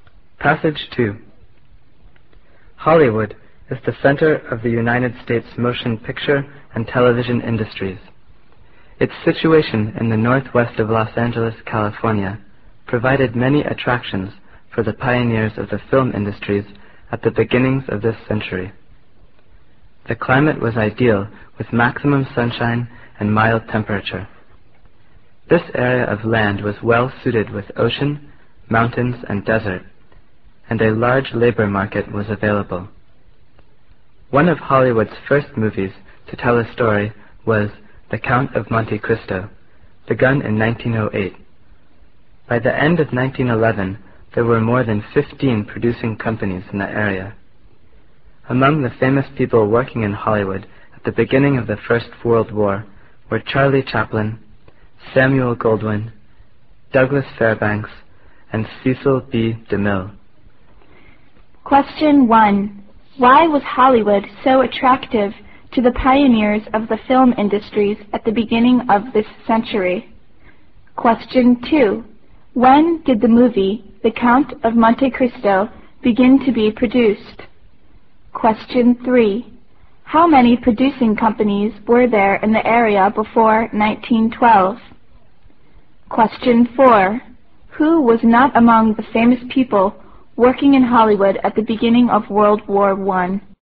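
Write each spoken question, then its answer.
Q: Why was Hollywood so attractive to the pioneers of the film industries at the beginning of this century?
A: Ideal climate, varied land and a large labor market

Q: When did the movie, The Count of Monte Cristo, begin to be produced?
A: 1908

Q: How many producing companies were there in the area before 1912?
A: More than 15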